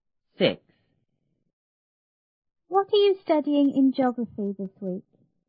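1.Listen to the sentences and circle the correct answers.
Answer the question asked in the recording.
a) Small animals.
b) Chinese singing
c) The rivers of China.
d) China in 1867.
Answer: c) The rivers of China.

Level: 初中英语广州版1B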